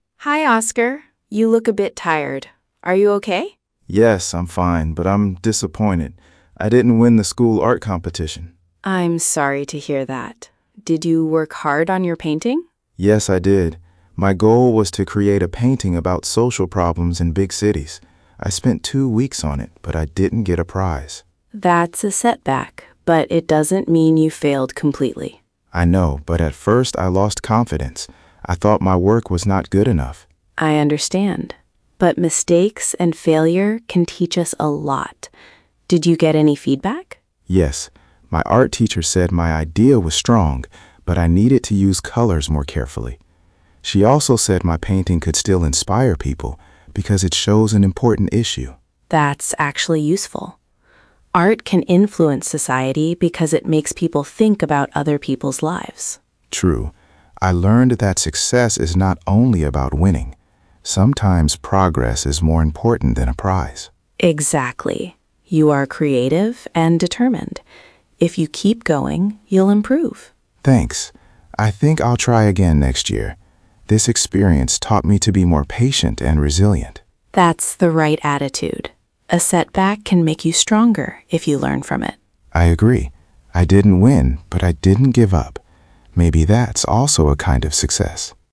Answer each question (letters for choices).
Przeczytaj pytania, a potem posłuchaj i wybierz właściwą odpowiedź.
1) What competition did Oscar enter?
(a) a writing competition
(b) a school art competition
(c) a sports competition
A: b

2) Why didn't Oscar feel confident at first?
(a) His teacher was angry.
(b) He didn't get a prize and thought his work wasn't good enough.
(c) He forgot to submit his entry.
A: b

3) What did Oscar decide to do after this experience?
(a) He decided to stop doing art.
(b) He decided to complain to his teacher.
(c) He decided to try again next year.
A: c

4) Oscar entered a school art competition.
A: True

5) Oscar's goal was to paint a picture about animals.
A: False

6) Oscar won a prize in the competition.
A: False

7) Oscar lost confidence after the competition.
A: True

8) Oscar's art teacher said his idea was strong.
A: True

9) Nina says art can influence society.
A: True

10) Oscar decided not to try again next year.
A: False

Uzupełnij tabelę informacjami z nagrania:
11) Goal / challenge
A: to create a painting about social problems in big cities

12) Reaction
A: he lost confidence and thought his work was not good enough

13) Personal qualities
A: creative, determined, patient, resilient

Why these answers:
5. his goal was to create a painting about social problems in big cities.
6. he didn't get a prize.
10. he decided to try again next year.

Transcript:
Nina: Hi, Oscar. You look a bit tired. Are you okay?
Oscar: Yes, I'm fine, but I'm disappointed. I didn't win the school art competition.
Nina: I'm sorry to hear that. Did you work hard on your painting?
Oscar: Yes, I did. My goal was to create a painting about social problems in big cities. I spent two weeks on it, but I didn't get a prize.
Nina: That's a setback, but it doesn't mean you failed completely.
Oscar: I know, but at first I lost confidence. I thought my work was not good enough.
Nina: I understand. But mistakes and failure can teach us a lot. Did you get any feedback?
Oscar: Yes. My art teacher said my idea was strong, but I needed to use colours more carefully. She also said my painting could still inspire people because it shows an important issue.
Nina: That's actually useful. Art can influence society because it makes people think about other people's lives.
Oscar: True. I learned that success is not only about winning. Sometimes progress is more important than a prize.
Nina: Exactly. You are creative and determined. If you keep going, you'll improve.
Oscar: Thanks. I think I'll try again next year. This experience taught me to be more patient and resilient.
Nina: That's the right attitude. A setback can make you stronger if you learn from it.
Oscar: I agree. I didn't win, but I didn't give up. Maybe that's also a kind of success.

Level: A2+/B1